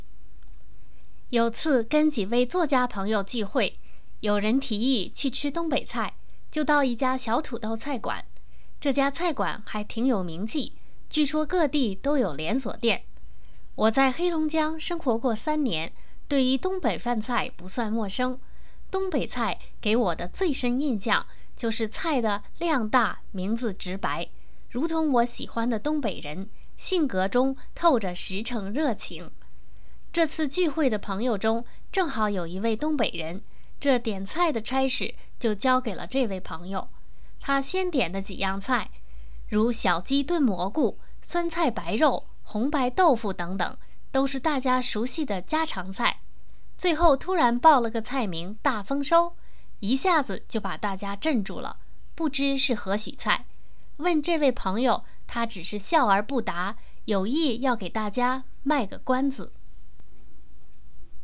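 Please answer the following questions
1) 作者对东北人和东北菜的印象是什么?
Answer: 东北菜量大,名字直白;东北人性格实诚热情

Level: 3rd Year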